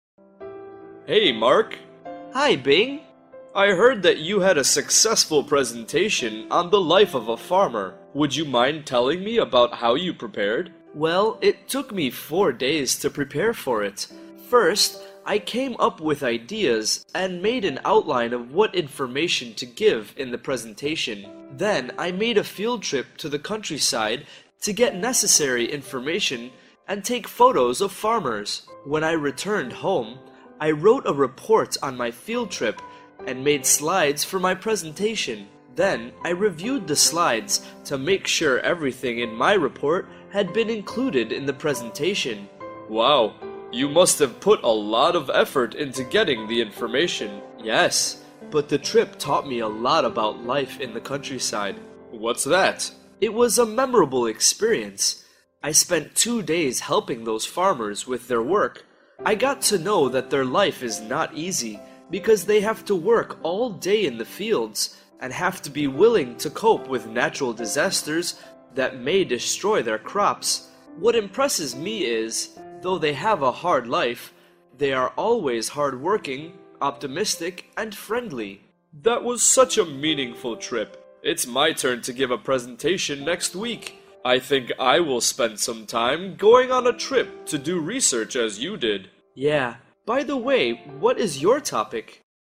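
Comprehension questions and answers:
Task: Number the steps in the correct order (1-5).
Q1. Make slides for the presentation.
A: 4

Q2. Visit the countryside for information and photos.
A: 2

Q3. Review the slides carefully.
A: 5

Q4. Write a report on the field trip.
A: 3

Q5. Come up with ideas and make an outline.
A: 1

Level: lớp 8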